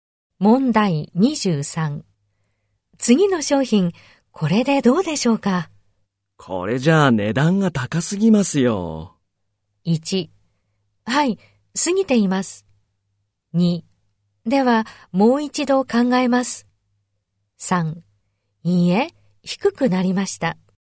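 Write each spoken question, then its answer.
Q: 次の商品、これでどうでしょうか?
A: 2: ではもう一度考えます。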